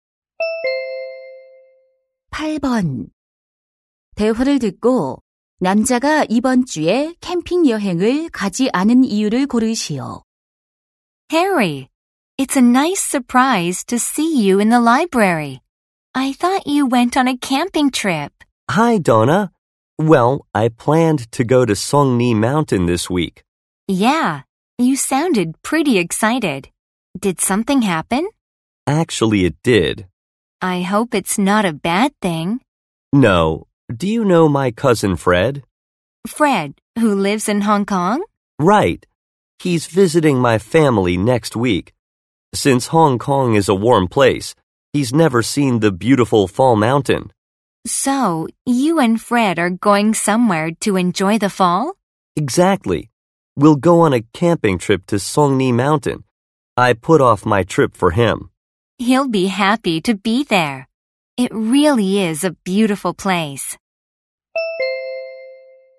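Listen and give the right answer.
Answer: 다음 주에 사촌 Fred가 방문해 함께 가려고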